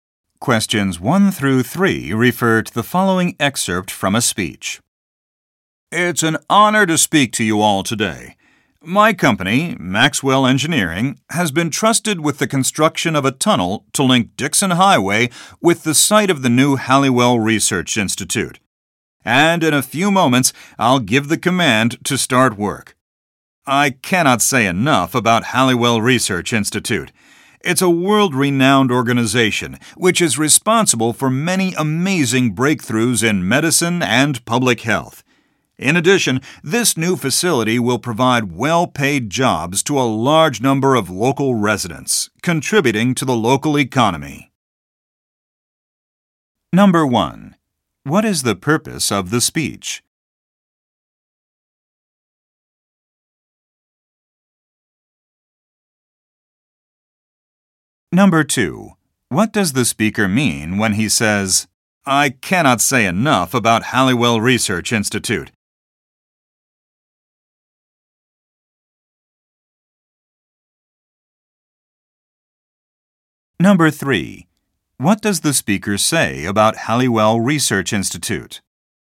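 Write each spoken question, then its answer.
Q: What is the purpose of the speech?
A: To mark the start of construction of a tunnel

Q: What does the speaker mean when he says, I cannot say enough about Halliwell Research Institute?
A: He greatly admires the institute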